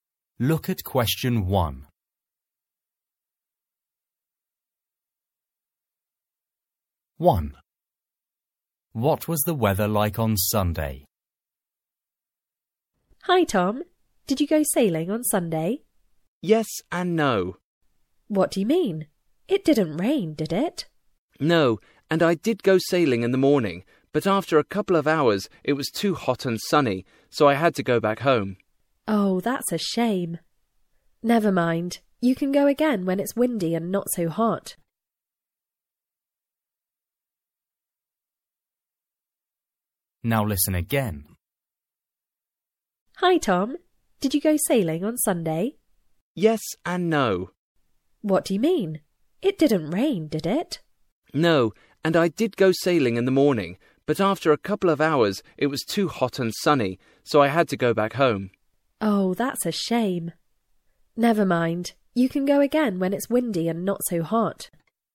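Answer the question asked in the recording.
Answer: hot and sunny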